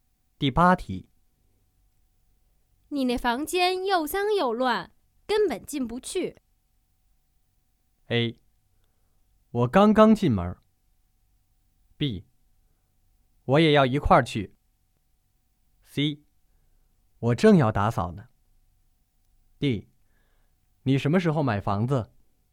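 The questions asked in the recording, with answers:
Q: 你那房间又脏又乱,根本进不去。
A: C: 我正要打扫呢。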